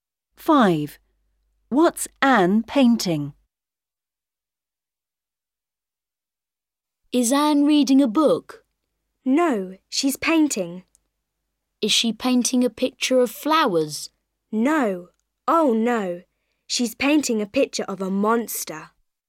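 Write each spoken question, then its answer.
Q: What's Anne painting?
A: a picture of a monster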